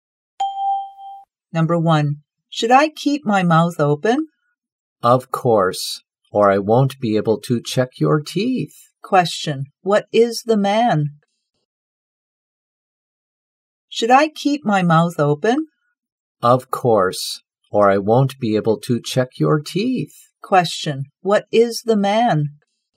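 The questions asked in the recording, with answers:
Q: what is the man?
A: A dentist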